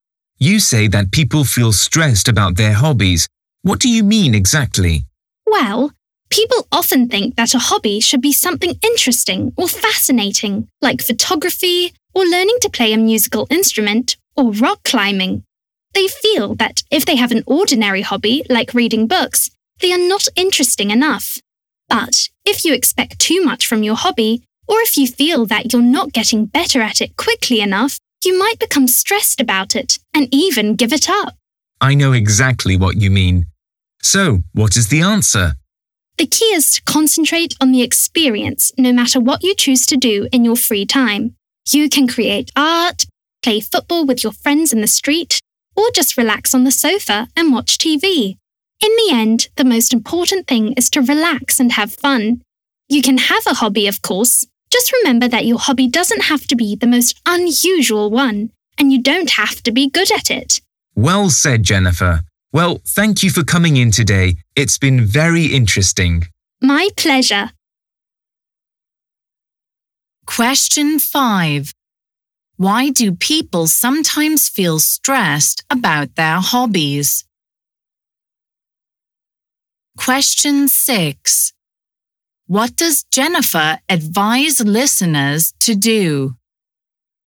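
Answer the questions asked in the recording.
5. They think their hobby isn't interesting enough or they expect too much from it
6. Concentrate on the experience, relax and have fun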